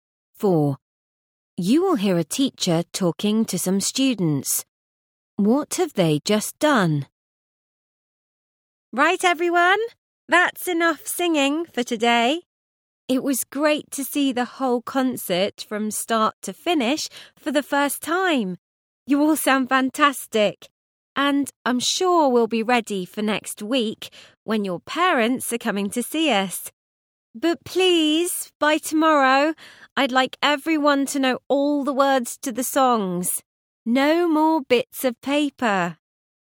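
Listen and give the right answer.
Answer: Rehearsed the whole concert from start to finish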